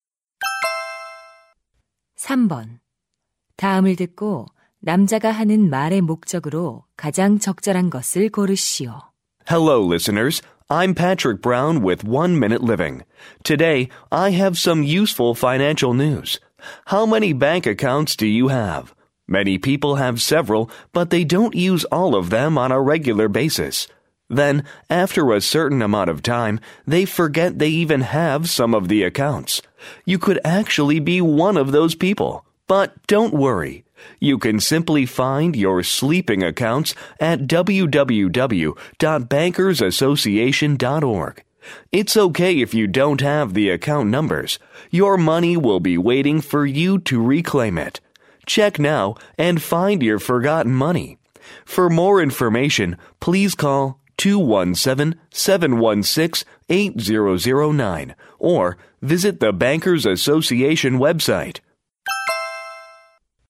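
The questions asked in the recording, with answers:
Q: 다음을 듣고 남자가 하는 말의 목적으로 가장 적절한 것을 고르시오.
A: 잊고 있던 휴면 계좌를 찾는 방법을 안내하려고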